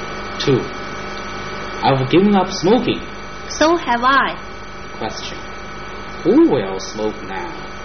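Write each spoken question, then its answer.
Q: Who will smoke now?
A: Neither of them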